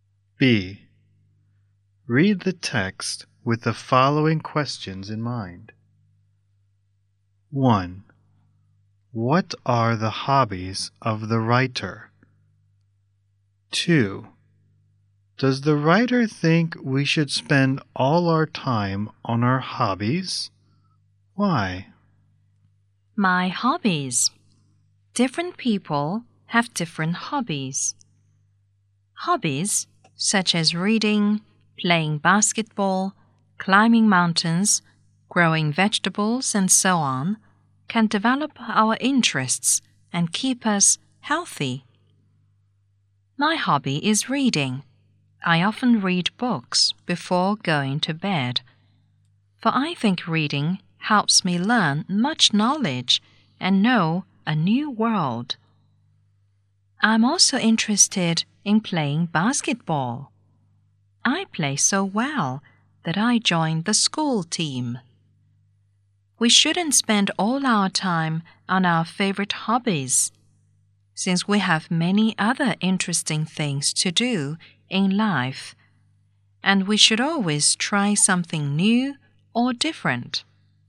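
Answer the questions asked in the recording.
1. Reading and playing basketball
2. No, because we have many other interesting things to do in life and should try something new or different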